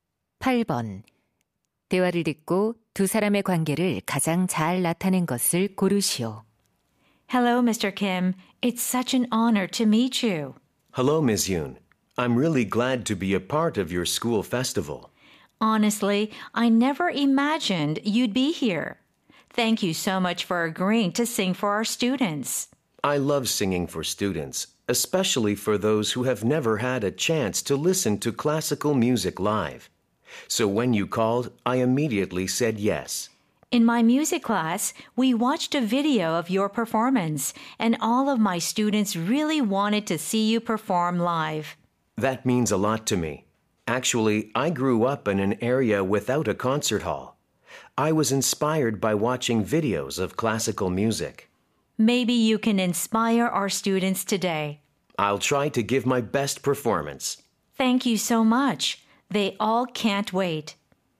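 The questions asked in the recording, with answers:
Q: 대화를 듣고 두 사람의 관계를 가장 잘 나타낸 것을 고르시오.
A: 음악 교사 – 성악가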